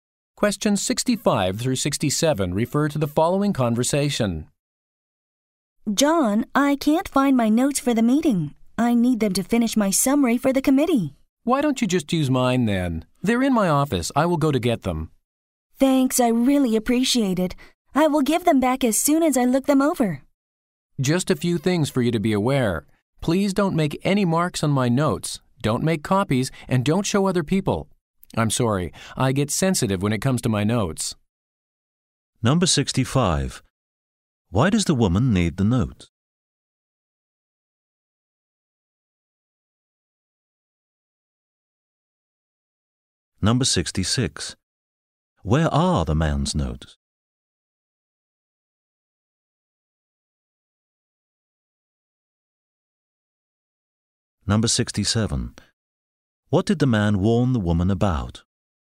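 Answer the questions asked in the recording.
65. To finish her summary for the committee
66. In his office
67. Not to mark, copy or show his notes to others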